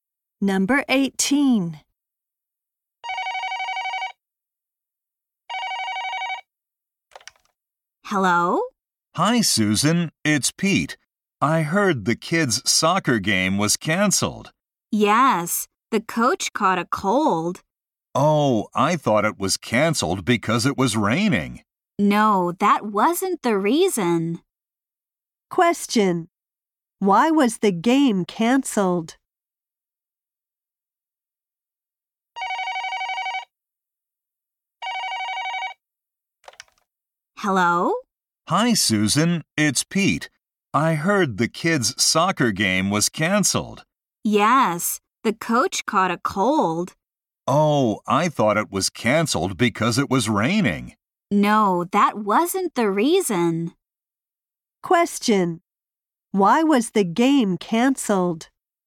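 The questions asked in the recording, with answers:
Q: Why was the game canceled?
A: The coach caught a cold.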